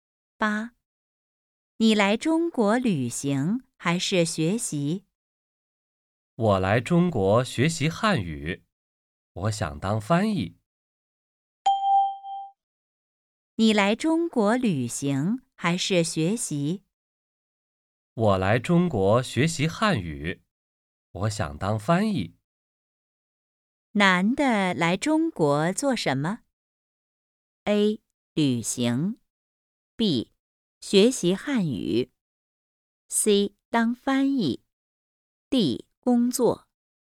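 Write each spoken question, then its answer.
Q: 男的来中国做什么?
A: B: 学习汉语。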